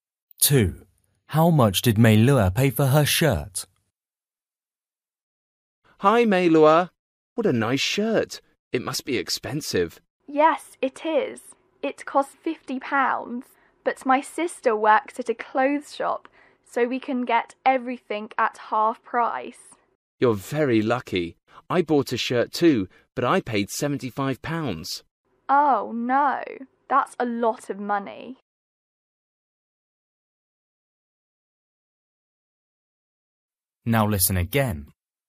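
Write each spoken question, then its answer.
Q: How much did Meilua pay for her shirt?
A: £25 (half price)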